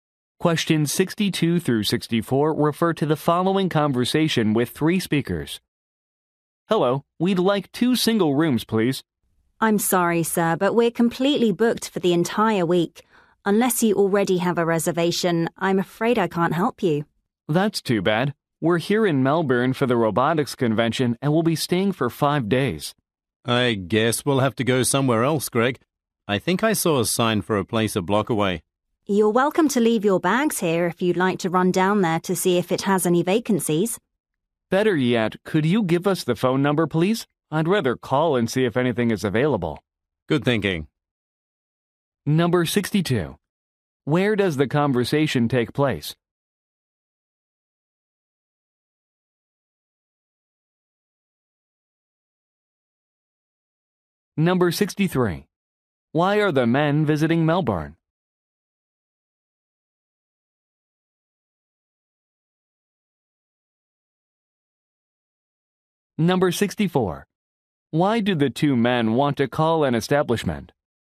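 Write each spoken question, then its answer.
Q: Where does the conversation take place?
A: At a hotel

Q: Why are the men visiting Melbourne?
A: For a robotics convention

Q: Why do the 2 men want to call an establishment?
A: To check for vacancies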